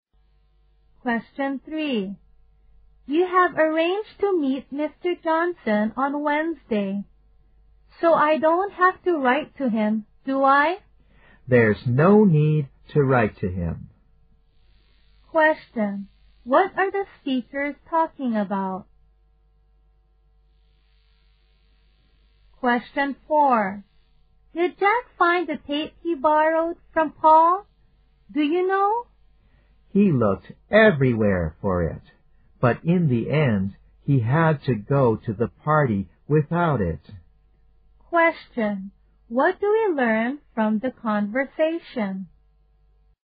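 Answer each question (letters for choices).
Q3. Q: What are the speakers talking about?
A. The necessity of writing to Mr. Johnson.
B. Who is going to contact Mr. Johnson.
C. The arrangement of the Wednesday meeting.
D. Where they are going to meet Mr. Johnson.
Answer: A

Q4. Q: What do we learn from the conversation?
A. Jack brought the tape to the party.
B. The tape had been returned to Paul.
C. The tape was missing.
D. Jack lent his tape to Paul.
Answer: C

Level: 大学英语四级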